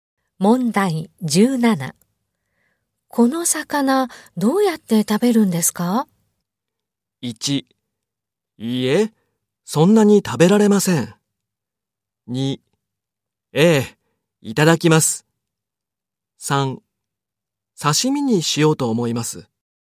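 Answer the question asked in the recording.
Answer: 3: 刺身にしようと思います。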